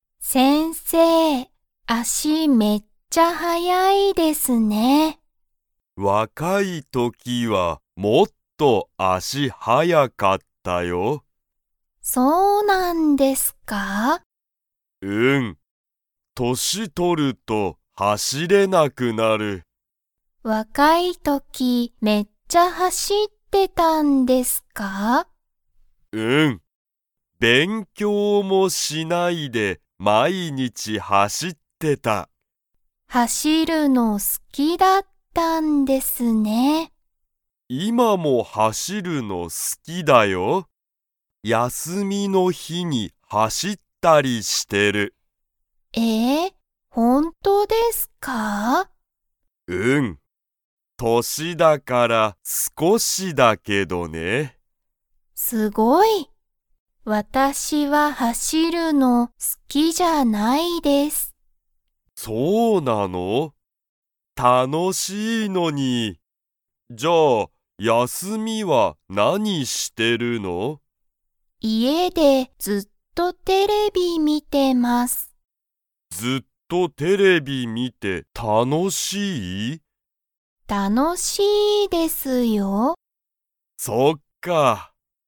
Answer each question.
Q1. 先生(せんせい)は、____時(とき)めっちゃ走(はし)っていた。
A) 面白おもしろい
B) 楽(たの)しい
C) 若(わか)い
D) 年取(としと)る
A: C) 若(わか)い

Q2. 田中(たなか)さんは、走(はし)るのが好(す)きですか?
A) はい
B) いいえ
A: B) いいえ

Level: Level 2

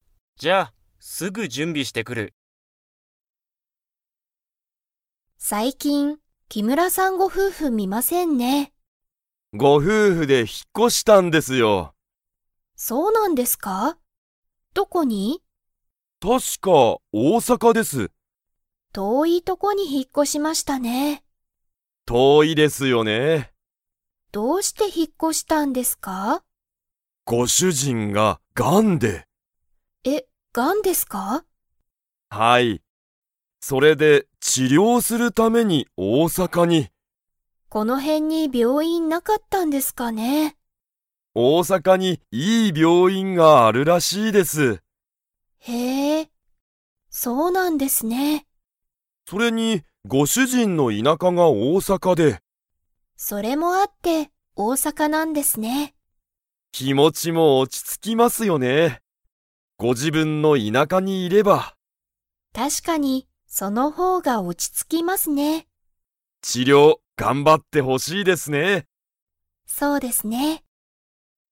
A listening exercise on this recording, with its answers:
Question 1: 木村きむらさん夫婦ふうふは、何なんのために大阪おおさかに引ひっ越こしましたか?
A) 仕事しごと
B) 買かい物もの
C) 大学だいがく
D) 治療ちりょう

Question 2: 大阪おおさかにはいい病院びょういんが 。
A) ある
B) ない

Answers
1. D) 治療ちりょう
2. A) ある

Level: Level 4

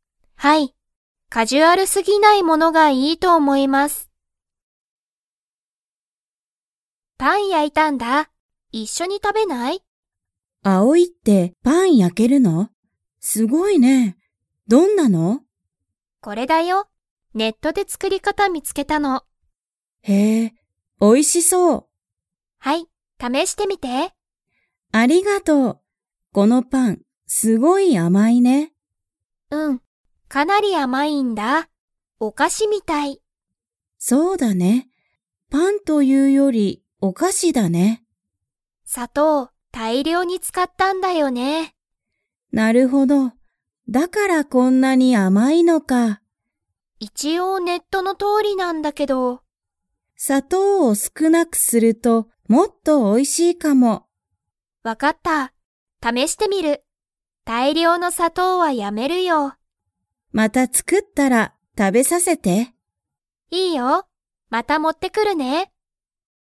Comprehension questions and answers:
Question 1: アオイは、何なにで作つくり方かたを見みつけましたか?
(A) テレビ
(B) ラジオ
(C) ネット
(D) アルバイト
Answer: (C) ネット

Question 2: アオイは、パンを つもりだ。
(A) また作つくる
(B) もう作つくらない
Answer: (A) また作つくる

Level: Level 4

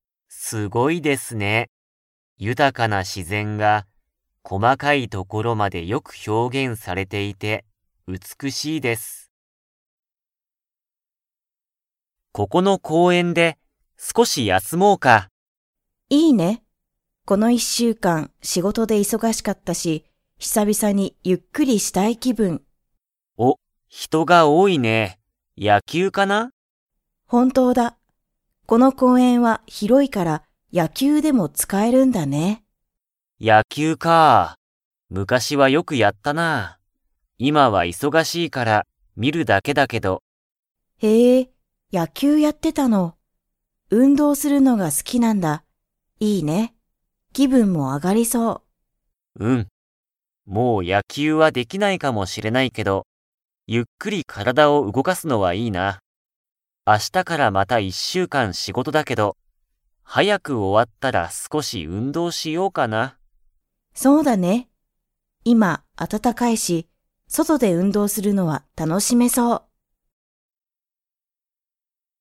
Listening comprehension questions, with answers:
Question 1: 公園こうえんでは、何なにをしていますか?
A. サッカー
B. ヨガ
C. 野球やきゅう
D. 仕事しごと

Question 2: イシイさんは、運動うんどうしようと 。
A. 思おもっている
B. 思おもっていない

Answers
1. C. 野球やきゅう
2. A. 思おもっている

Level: Level 4

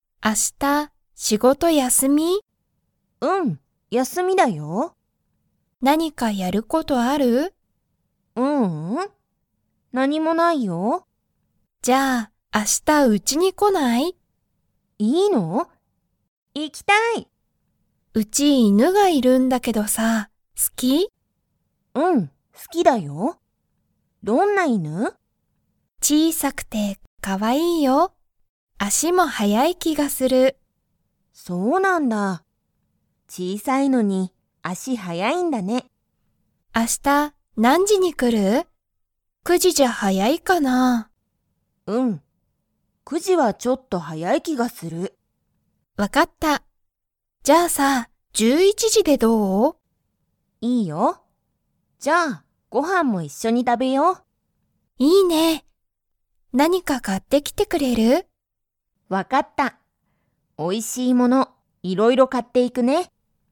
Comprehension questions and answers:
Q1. ユミは明日(あした)、9(く)時(じ)にナオミのうちに行(い)きますか?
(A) はい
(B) いいえ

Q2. ナオミとユミは、一緒(いっしょ)に____。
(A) 犬(いぬ)と遊(あそ)ぶ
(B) 仕事(しごと)をする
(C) 速(はや)く走(はし)る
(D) ご飯(はん)を食(た)べる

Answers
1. (B) いいえ
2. (D) ご飯(はん)を食(た)べる

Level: Level 2

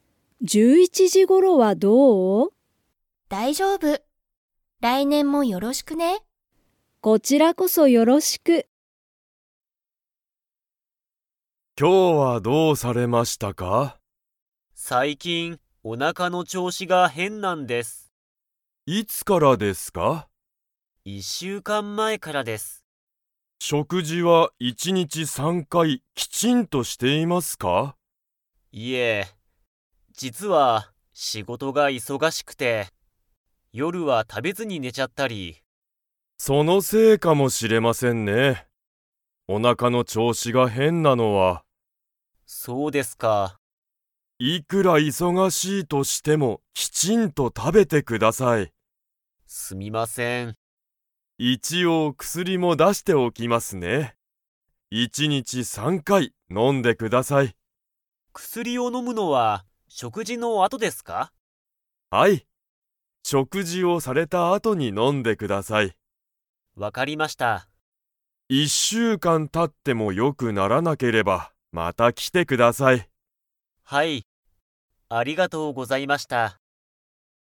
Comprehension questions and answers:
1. 小林こばやしさんは の調子ちょうしが変へんだ。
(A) 背中せなか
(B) 頭あたま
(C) 足あし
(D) おなか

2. 医者いしゃは、小林こばやしさんに薬くすりを出だしますか?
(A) はい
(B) いいえ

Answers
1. (D) おなか
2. (A) はい

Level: Level 4

